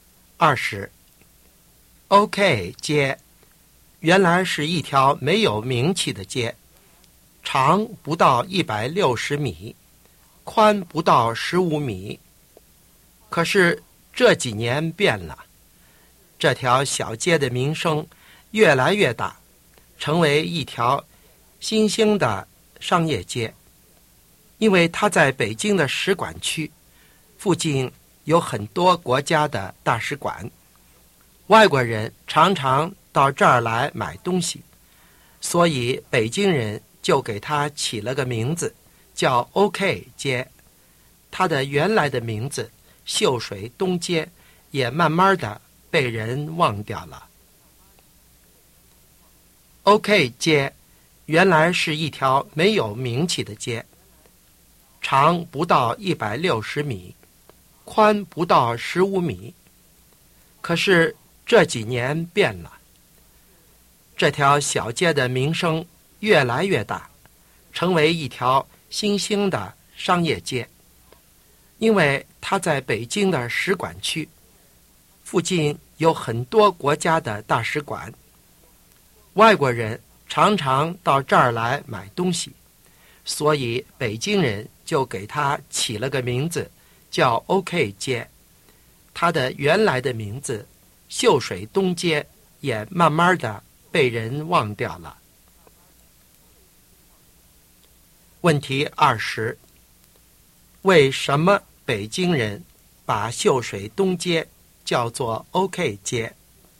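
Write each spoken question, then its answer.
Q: 为什么北京人把秀水东街叫做 OK 街?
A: 因为它在使馆区附近,外国人常到这儿买东西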